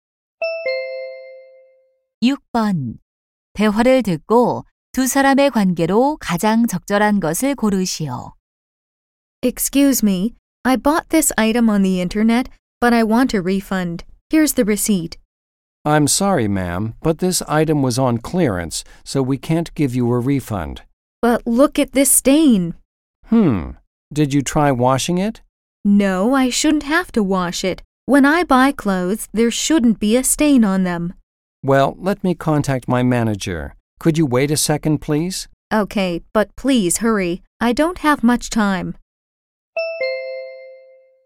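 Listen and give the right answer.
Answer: 손님과 점원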